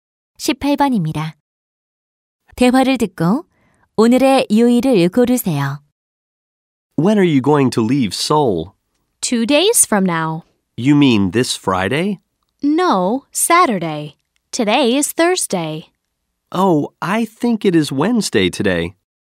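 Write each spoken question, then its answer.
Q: 대화를 듣고 오늘의 요일을 고르세요.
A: 목요일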